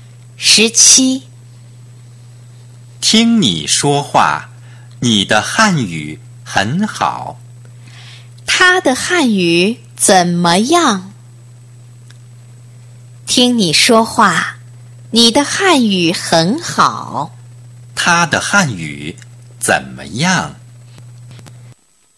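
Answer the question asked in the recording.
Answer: 很好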